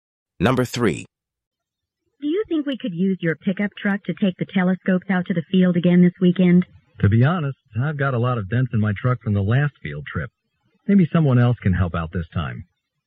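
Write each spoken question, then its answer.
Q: What does the man imply?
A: He doesn't want to lend his truck this time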